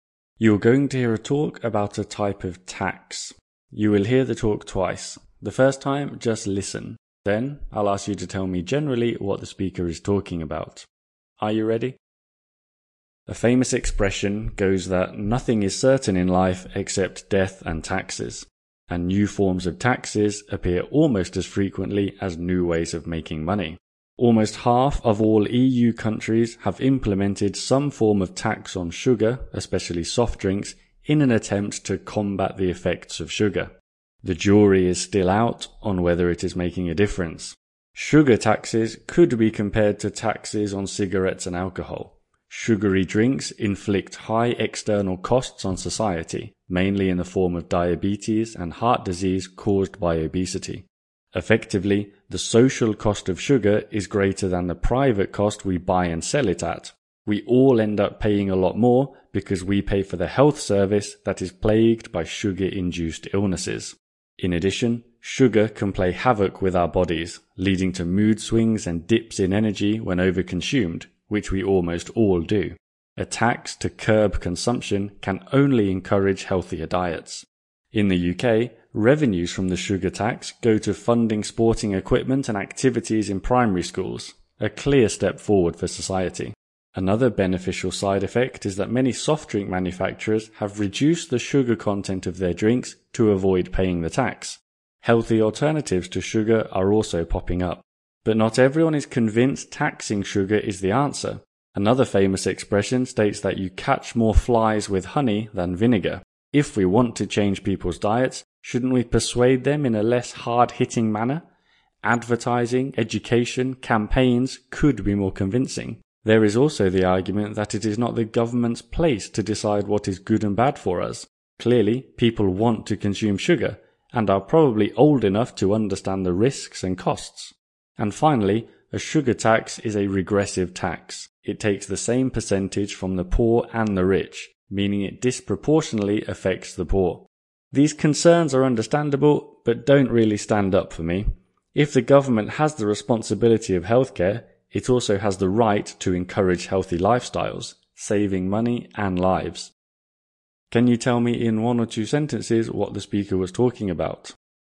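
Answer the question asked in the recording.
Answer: The pros and cons of taxing sugar, especially in soft drinks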